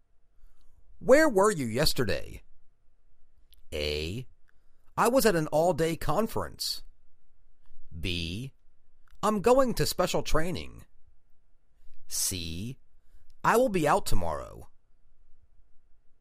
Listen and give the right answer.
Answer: I was at an all-day conference.